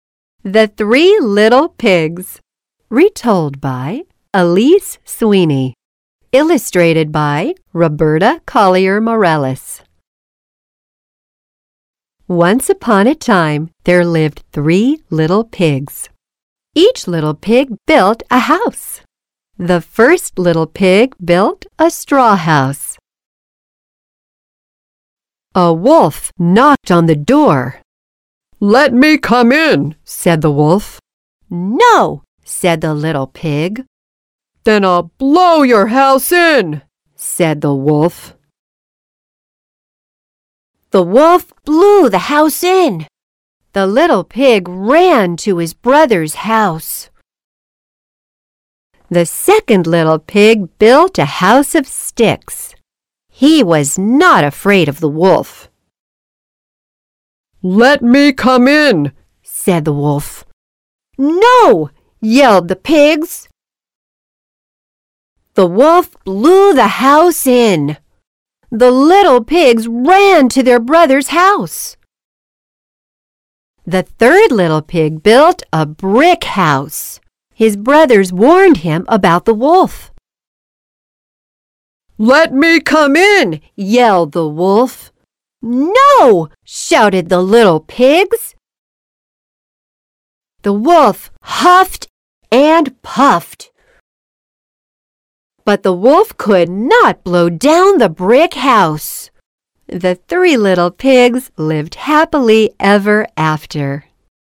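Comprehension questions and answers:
After the story, let's think about these questions.听完故事后,我们来思考一下这些问题:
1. How did the big wolf break the pigs' straw house and stick house? (请问大野狼是如何弄坏小猪们的稻草屋和木柴屋的呢?)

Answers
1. He blew the houses in.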